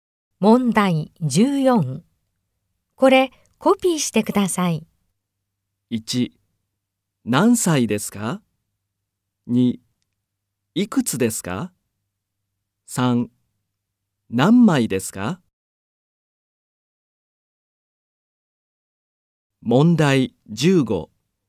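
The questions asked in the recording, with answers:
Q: これコピーしてください。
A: 3: 何枚ですか?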